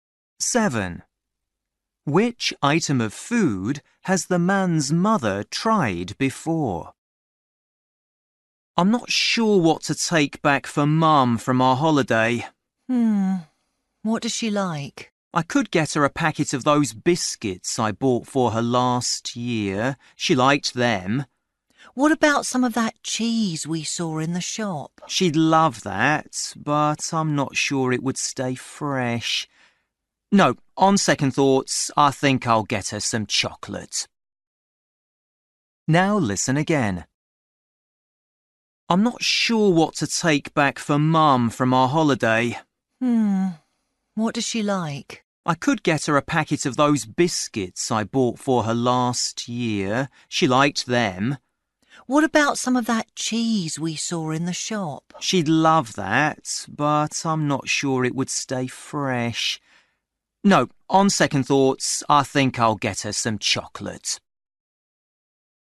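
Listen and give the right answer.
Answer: biscuits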